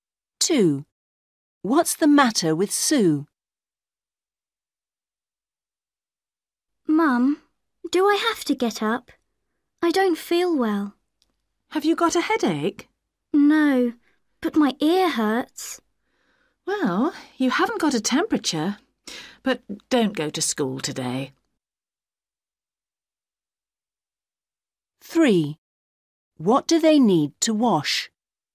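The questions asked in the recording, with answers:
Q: What's the matter with Sue?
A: Her ear hurts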